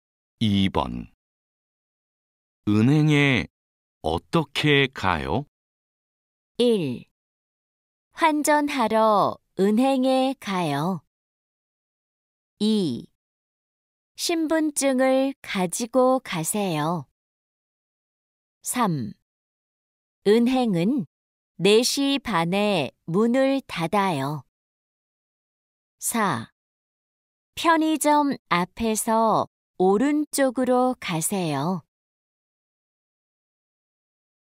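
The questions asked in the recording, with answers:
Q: 은행에 어떻게 가요?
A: 4: 편의점 앞에서 오른쪽으로 가세요.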